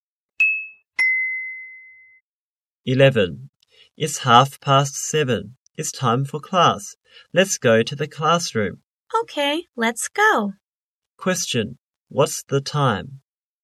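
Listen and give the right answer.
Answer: 7:30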